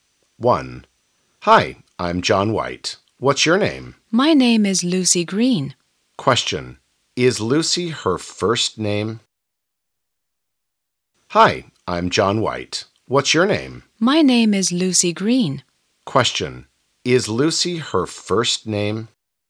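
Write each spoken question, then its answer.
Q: Is Lucy her first name?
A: Yes, it is.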